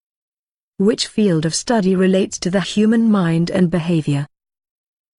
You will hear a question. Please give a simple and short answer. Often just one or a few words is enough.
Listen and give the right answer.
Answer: Psychology